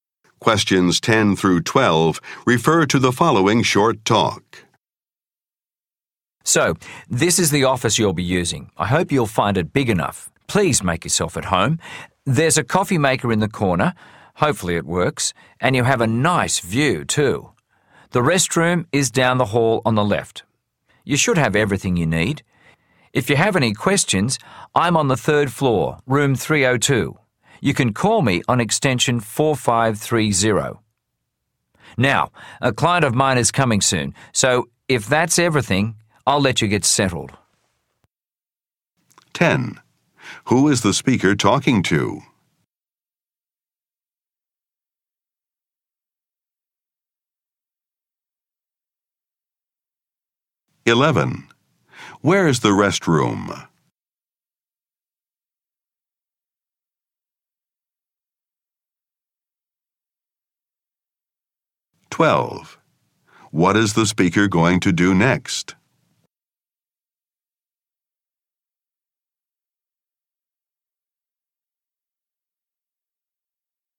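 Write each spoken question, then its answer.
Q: Where is the restroom?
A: Down the hall on the left

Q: What is the speaker going to do next?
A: Meet a client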